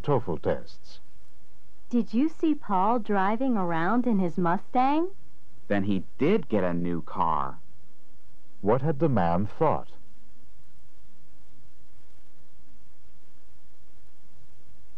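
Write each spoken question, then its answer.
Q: What had the man thought?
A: That Paul had not bought a new car.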